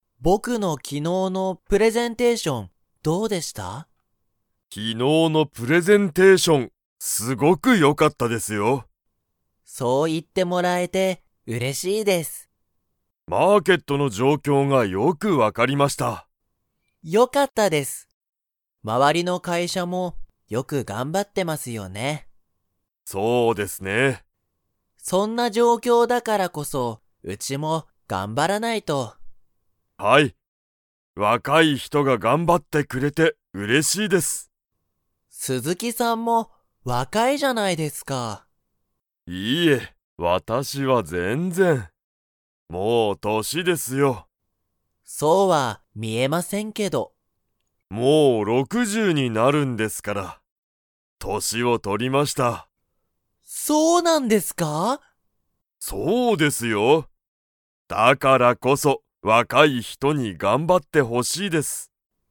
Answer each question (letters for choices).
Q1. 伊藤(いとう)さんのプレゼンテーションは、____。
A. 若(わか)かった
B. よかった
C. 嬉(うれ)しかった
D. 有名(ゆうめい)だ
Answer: B

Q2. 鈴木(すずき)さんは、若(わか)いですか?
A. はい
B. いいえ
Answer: B